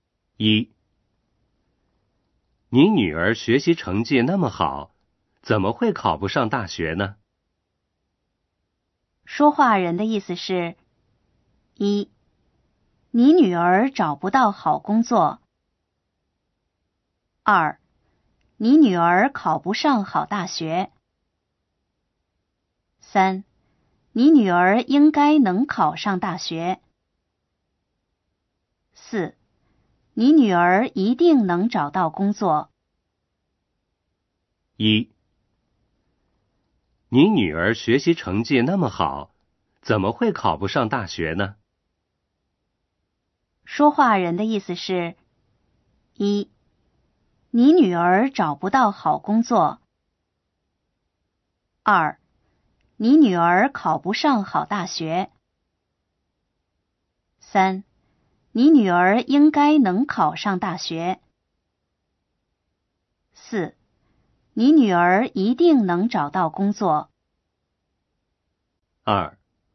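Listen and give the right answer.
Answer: 三: 你女儿应该能考上大学。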